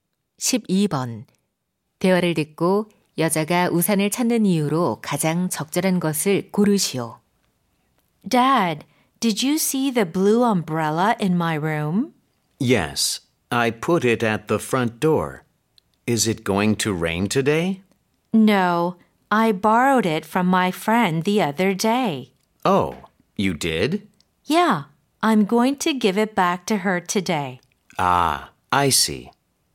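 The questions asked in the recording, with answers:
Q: 대화를 듣고 여자가 우산을 찾는 이유로 가장 적절한 것을 고르시오.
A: 친구에게 돌려주려고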